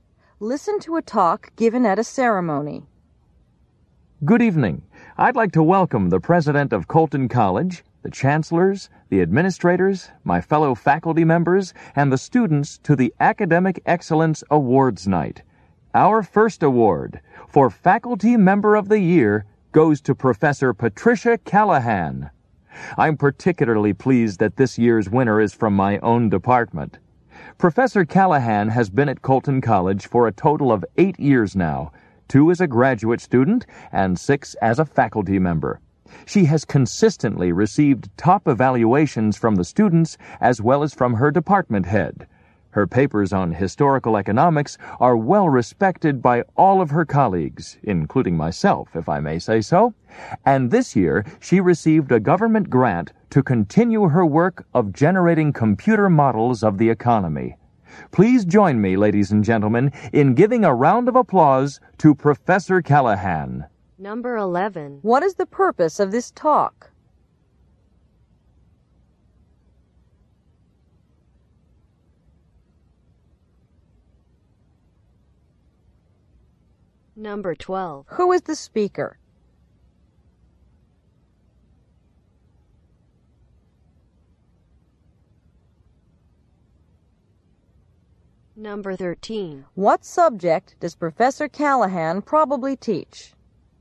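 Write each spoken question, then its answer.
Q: What is the purpose of this talk?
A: To present a Faculty Member of the Year award

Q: Who is the speaker?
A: A faculty member in Professor Callahan's department

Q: What subject does Professor Callahan probably teach?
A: Economics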